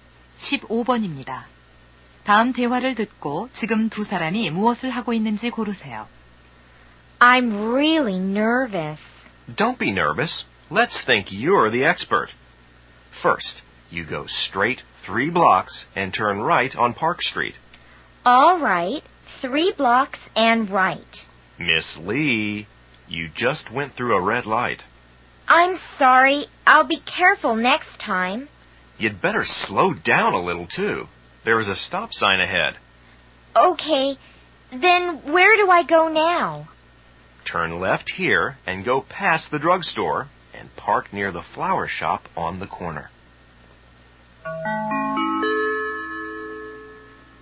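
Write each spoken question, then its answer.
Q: 다음 대화를 듣고 지금 두 사람이 무엇을 하고 있는지 고르세요.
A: 운전 연습(운전 시험)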